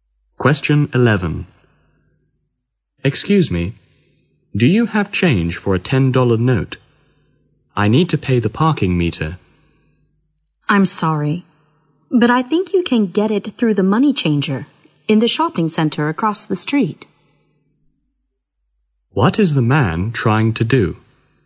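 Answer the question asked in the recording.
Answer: Get change for a $10 note to pay the parking meter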